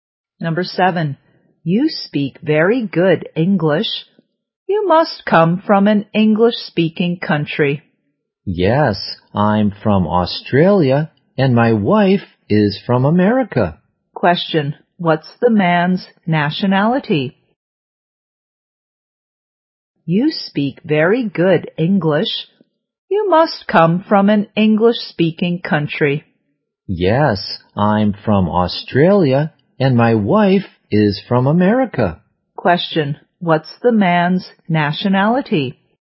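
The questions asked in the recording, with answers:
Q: what's the man's nationality?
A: Australian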